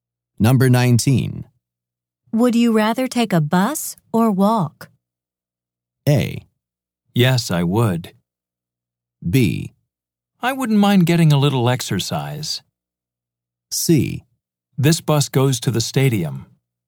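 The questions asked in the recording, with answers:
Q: Would you rather take a bus or walk?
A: B: I wouldn't mind getting a little exercise.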